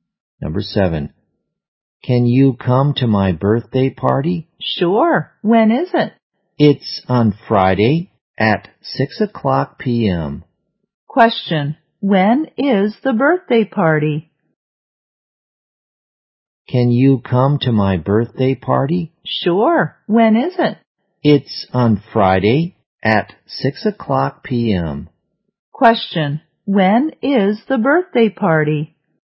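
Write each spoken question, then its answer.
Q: When is the birthday party?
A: On Friday at 6 p.m.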